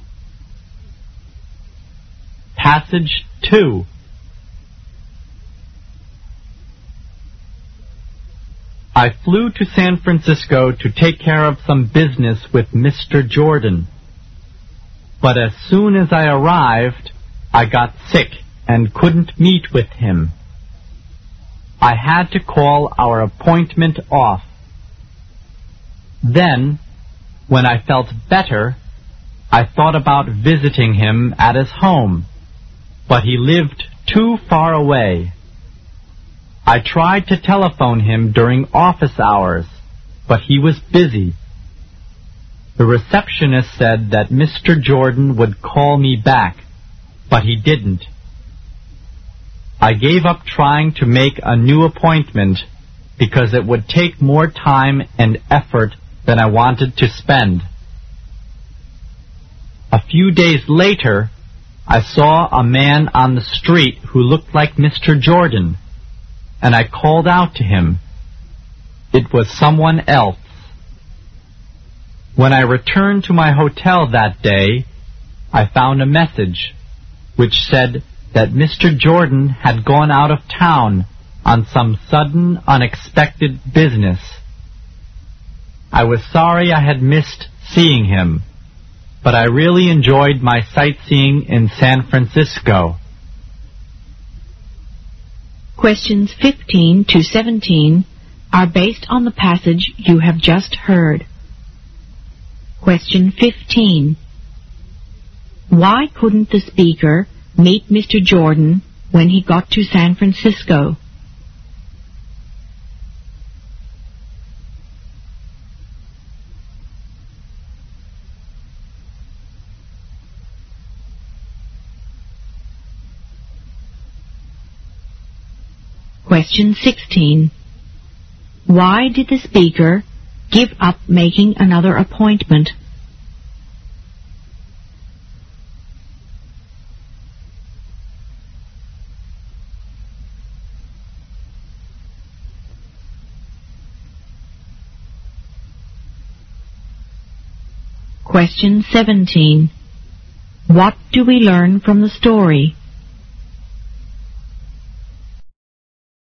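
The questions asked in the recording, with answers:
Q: Why couldn't the speaker meet Mr. Jordan when he got to San Francisco?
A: He got sick.

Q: Why did the speaker give up making another appointment?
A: It would take more time and effort than he wanted to spend.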